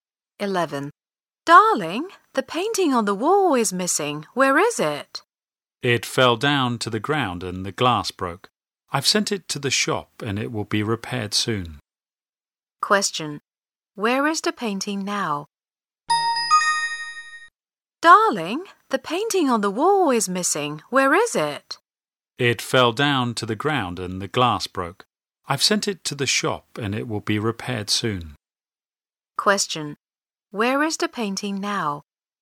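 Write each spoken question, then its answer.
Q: Where is the painting now?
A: In the shop, being repaired.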